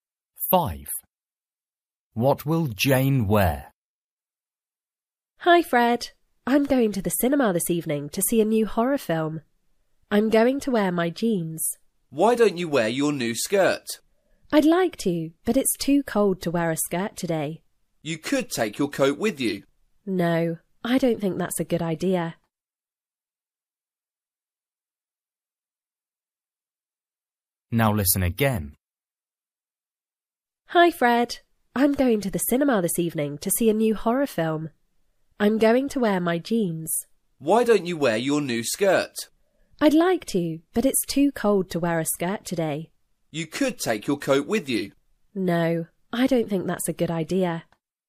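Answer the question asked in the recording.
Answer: Jeans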